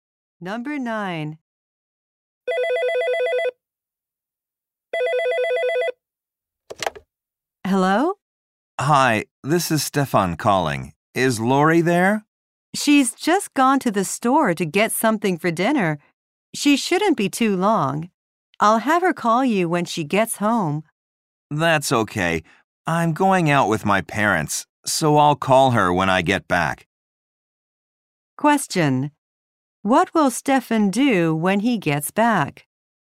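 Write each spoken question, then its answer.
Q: What will Stefan do when he gets back?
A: Call Lori.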